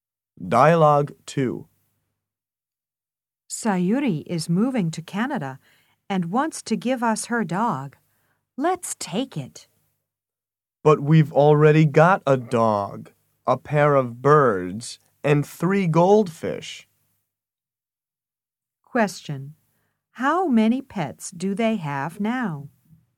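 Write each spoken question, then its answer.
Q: How many pets do they have now?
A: Six (a dog, two birds and three goldfish)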